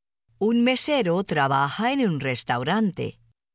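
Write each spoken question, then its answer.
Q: Un mesero trabaja en un restaurante.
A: Sí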